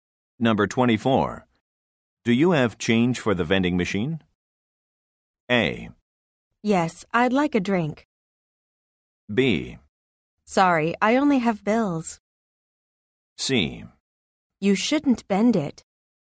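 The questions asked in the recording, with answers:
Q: Do you have change for the vending machine?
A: B: Sorry, I only have bills.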